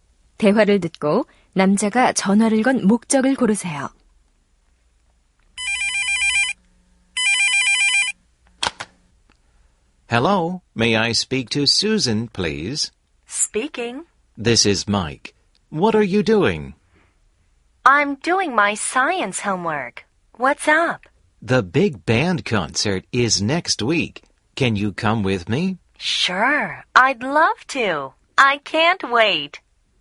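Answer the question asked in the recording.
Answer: 콘서트에 같이 가자고 하려고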